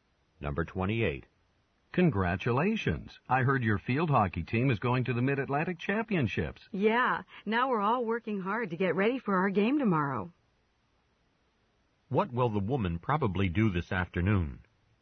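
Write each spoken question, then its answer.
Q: What will the woman probably do this afternoon?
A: Practice for the field hockey game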